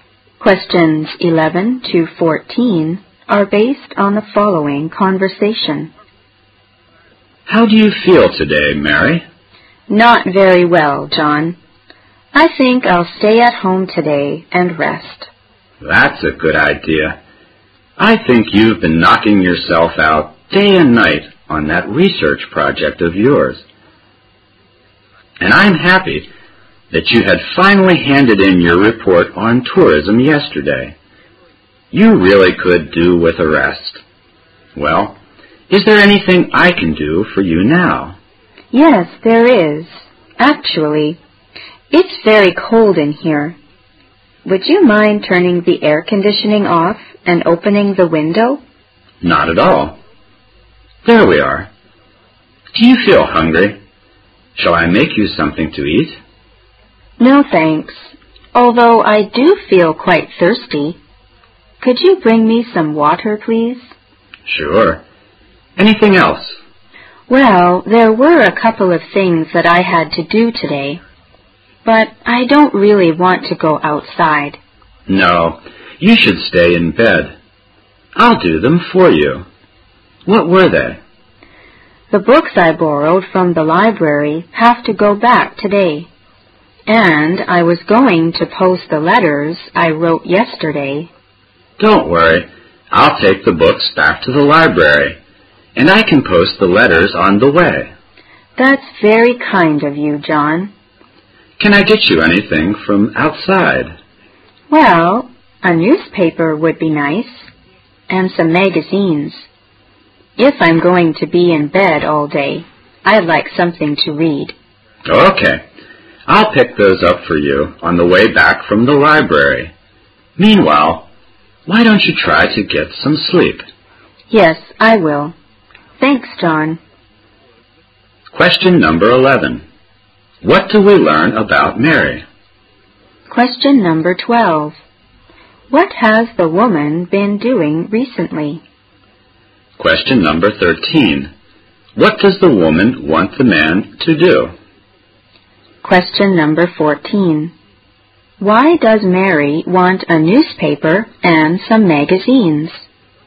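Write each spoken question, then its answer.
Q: What do we learn about Mary?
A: She is not feeling well.

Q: What has the woman been doing recently?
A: Working hard day and night on a research project (a report on tourism).

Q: Why does Mary want a newspaper and some magazines?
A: She'll be in bed all day and wants something to read.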